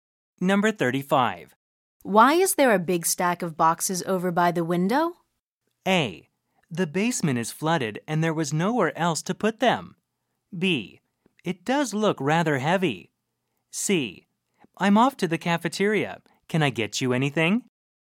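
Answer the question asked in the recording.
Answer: A: The basement is flooded and there was nowhere else to put them.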